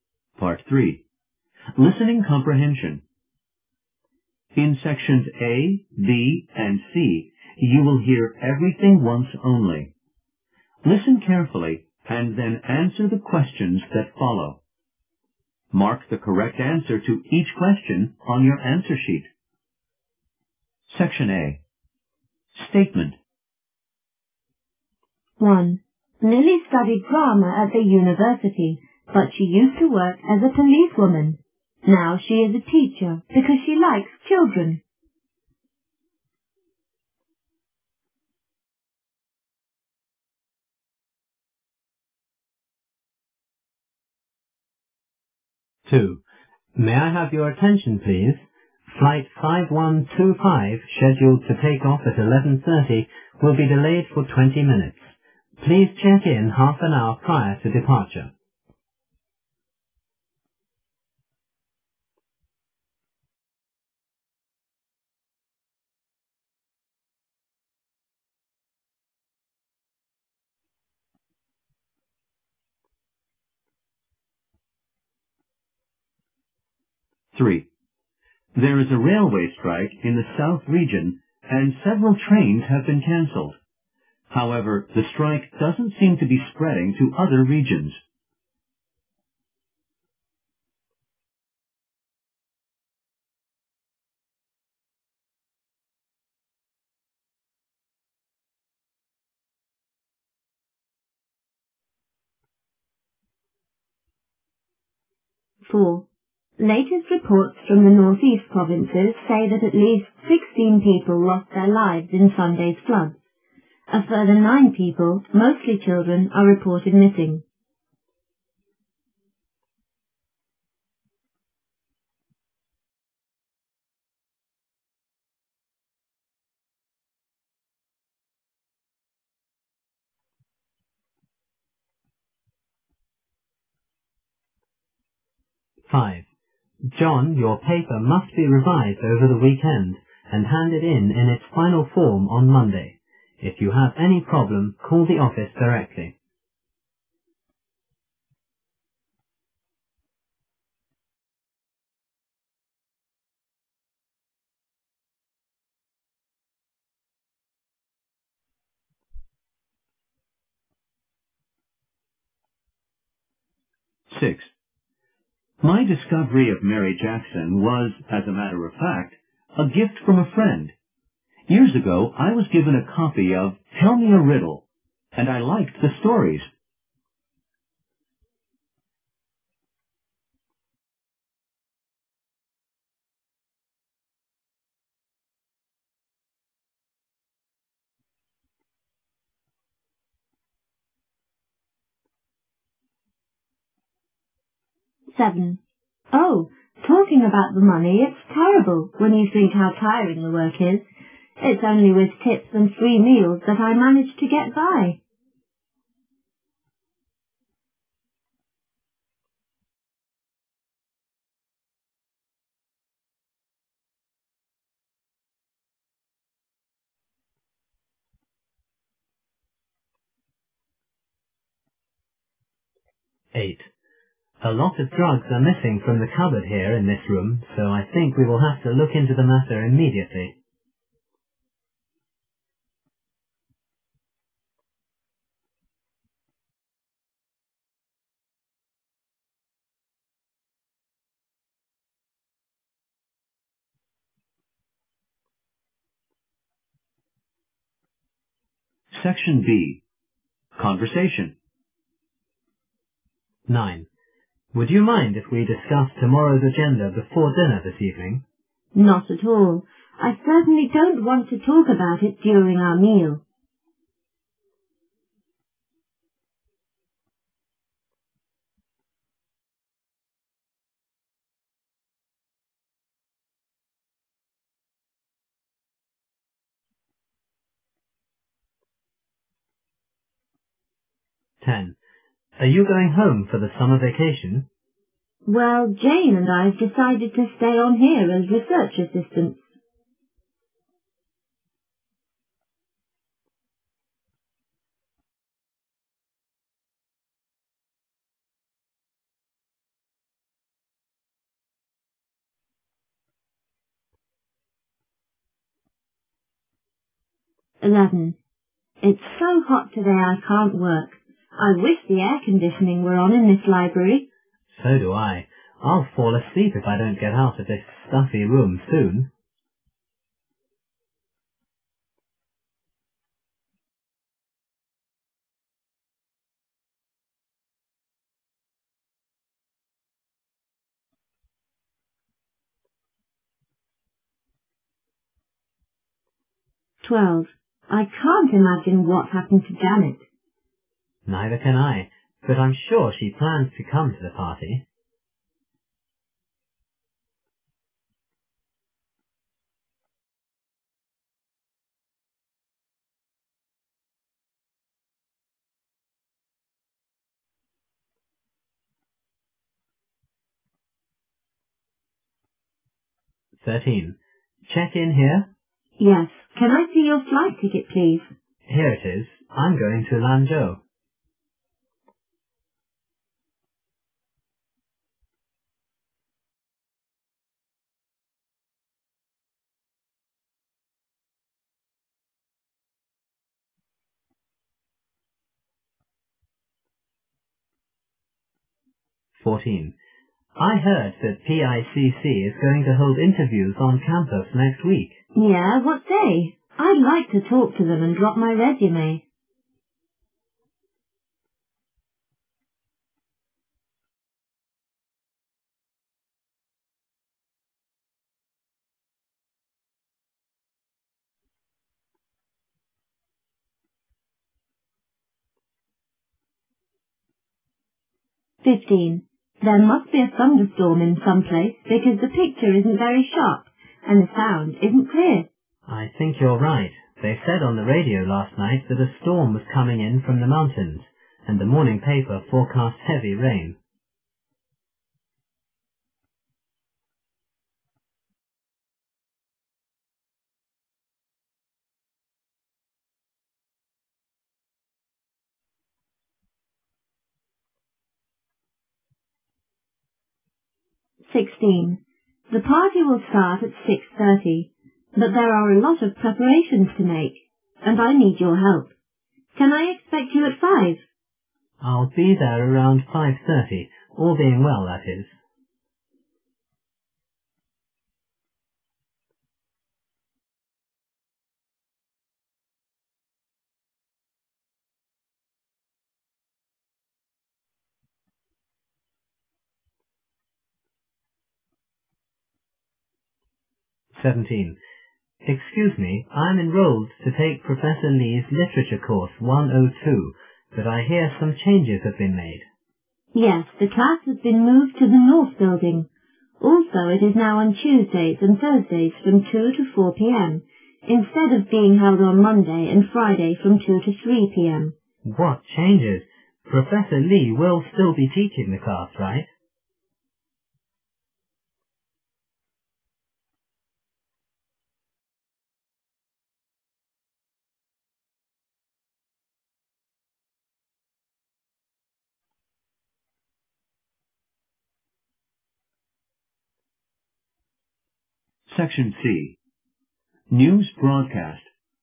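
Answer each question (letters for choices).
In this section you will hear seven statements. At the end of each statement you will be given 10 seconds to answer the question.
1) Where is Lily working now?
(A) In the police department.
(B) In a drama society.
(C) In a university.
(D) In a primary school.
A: D

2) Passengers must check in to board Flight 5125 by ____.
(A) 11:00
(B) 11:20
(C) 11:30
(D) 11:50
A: B

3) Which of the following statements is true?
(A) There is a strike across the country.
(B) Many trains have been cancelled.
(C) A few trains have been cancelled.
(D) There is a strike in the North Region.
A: C

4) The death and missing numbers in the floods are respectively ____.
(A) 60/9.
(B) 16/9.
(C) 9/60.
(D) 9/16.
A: B

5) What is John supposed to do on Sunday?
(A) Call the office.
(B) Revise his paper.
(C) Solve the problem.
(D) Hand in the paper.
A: B

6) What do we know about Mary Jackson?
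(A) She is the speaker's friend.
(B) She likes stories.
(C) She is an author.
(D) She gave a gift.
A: C

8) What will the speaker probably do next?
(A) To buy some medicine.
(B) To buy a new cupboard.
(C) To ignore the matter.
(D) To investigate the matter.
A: D

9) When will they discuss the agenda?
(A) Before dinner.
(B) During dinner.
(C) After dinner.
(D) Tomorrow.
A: A

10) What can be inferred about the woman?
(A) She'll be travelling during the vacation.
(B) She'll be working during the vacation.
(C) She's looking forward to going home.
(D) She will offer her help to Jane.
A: B

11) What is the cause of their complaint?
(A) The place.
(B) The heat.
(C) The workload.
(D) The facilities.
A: B

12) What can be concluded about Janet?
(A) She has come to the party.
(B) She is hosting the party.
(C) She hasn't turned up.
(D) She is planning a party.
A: C

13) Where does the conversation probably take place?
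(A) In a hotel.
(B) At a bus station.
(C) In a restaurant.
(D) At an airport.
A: D

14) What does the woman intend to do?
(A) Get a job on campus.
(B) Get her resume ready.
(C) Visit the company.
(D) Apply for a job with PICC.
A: D

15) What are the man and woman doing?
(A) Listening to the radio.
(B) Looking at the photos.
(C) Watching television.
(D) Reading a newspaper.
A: C

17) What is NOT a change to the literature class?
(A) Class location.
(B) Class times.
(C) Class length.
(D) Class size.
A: D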